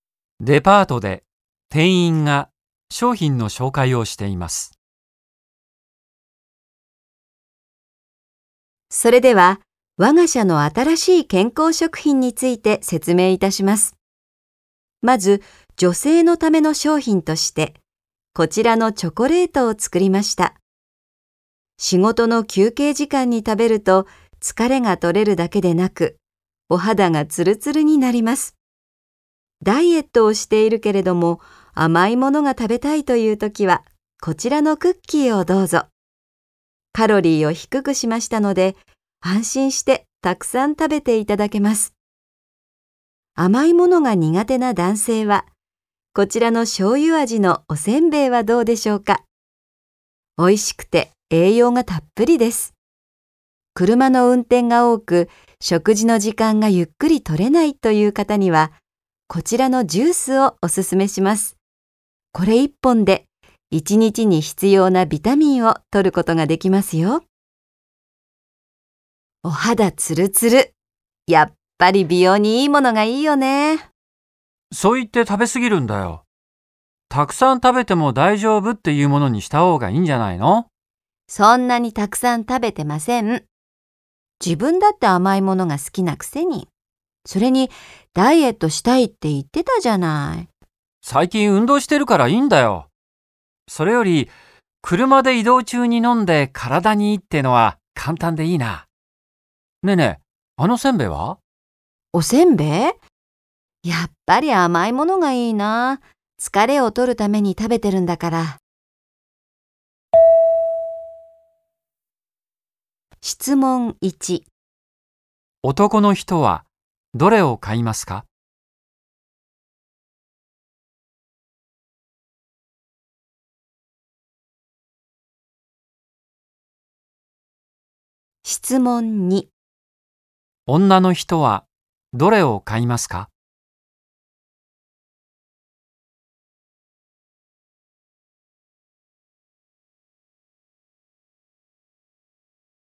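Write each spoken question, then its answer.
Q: 男の人はどれを買いますか?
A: ジュース

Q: 女の人はどれを買いますか?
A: チョコレート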